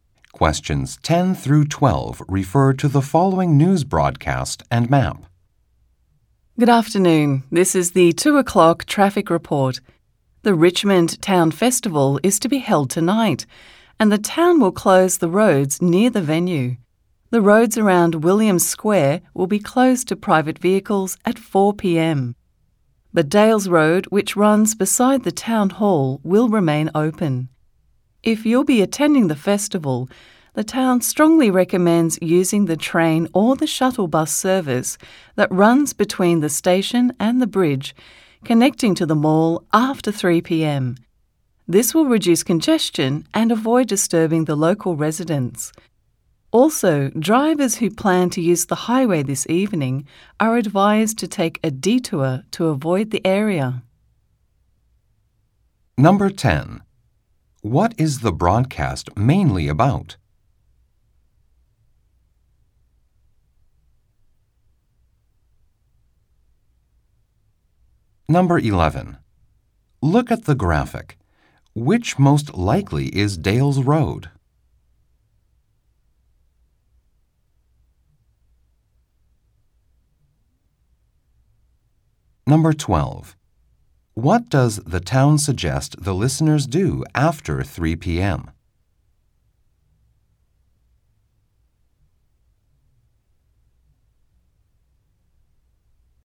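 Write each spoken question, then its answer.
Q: What is the broadcast mainly about?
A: Road closures because of the Richmond Town Festival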